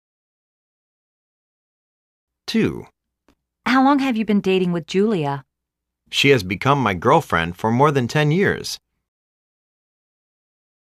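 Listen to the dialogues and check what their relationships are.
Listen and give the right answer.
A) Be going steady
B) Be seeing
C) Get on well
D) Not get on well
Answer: A) Be going steady

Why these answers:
A:How long have you been dating with Julia? B:She has become my girlfriend for more than 10 years.

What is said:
A:Why don't you talk to your father?
B:Well,I don't know. Whenever we talk, he makes me very nervous...
A:How long have you been dating with Julia?
B:She has become my girlfriend for more than 10 years.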